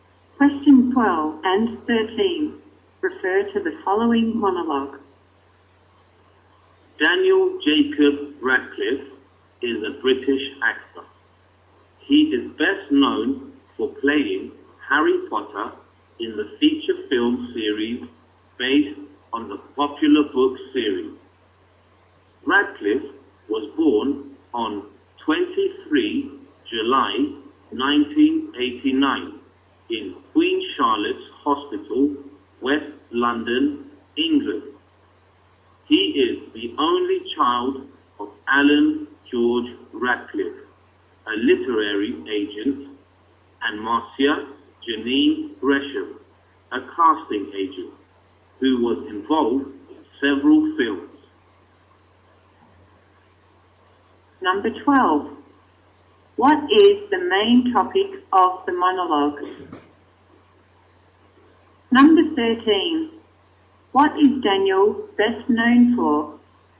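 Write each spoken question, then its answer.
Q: What is the main topic of the monologue?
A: Daniel Radcliffe, a British actor

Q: What is Daniel best known for?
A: Playing Harry Potter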